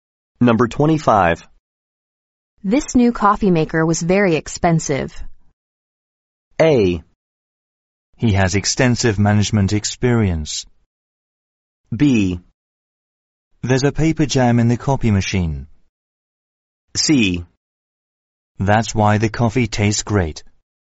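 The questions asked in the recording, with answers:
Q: This new coffee maker was very expensive.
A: C: That's why the coffee tastes great.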